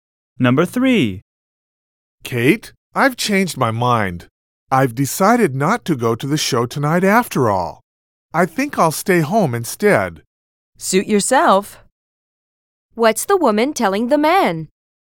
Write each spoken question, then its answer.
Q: What's the woman telling the man?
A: she is telling the man that he should do whatever he wants to do.